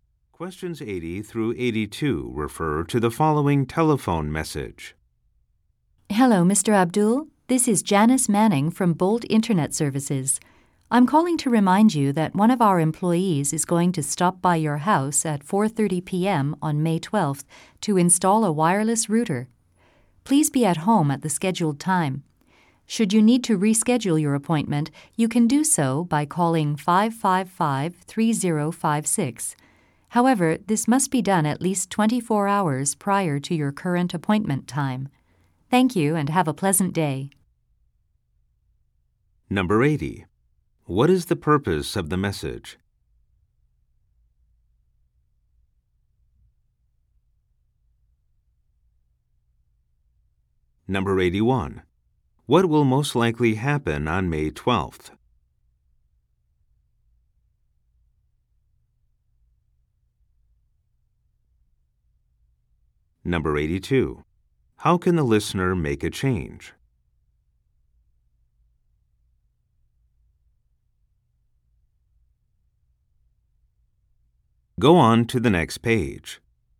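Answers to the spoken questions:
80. To remind him of an appointment
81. A wireless router will be installed
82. By calling 555-3056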